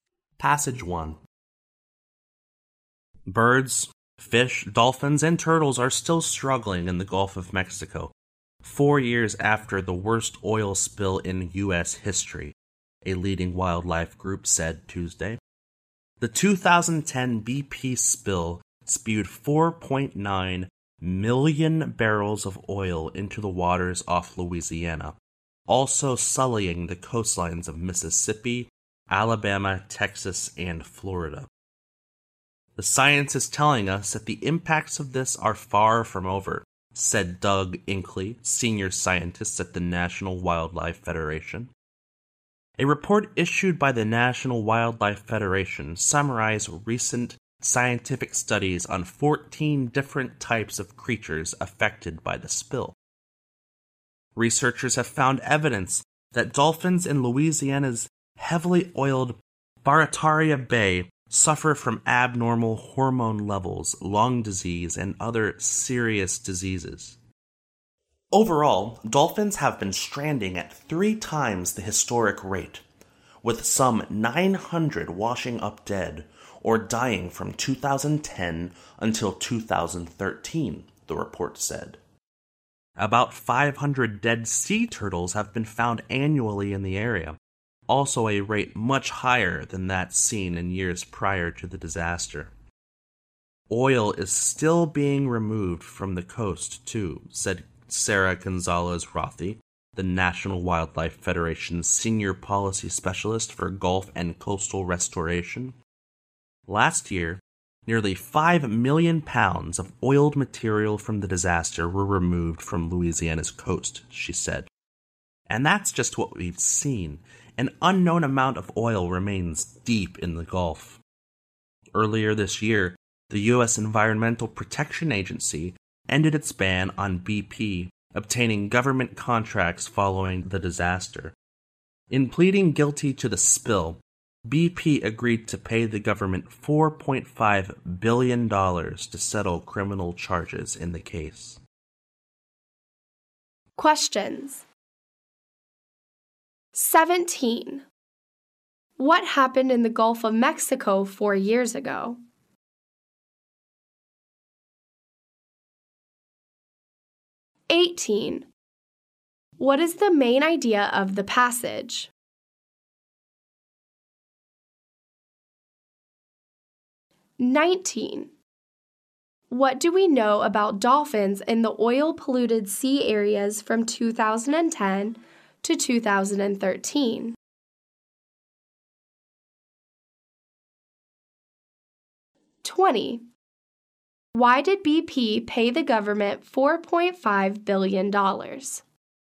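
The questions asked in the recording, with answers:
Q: What happened in the Gulf of Mexico 4 years ago?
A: The worst oil spill in U.S. history (the BP spill)

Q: What is the main idea of the passage?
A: Wildlife in the Gulf is still suffering from the oil spill years later

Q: What do we know about dolphins in the oil-polluted sea areas from 2010 to 2013?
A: They stranded at three times the historic rate, with about 900 found dead or dying

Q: Why did BP pay the government $4.5 billion?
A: To settle criminal charges over the spill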